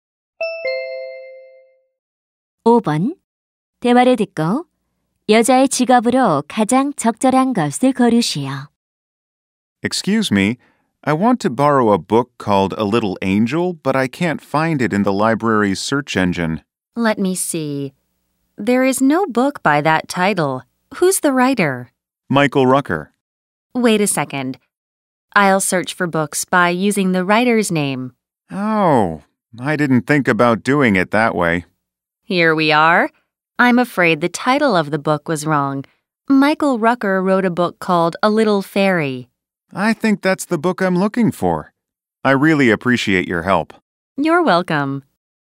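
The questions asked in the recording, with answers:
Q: 대화를 듣고 여자의 직업으로 가장 적절한 것을 고르시오.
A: 사서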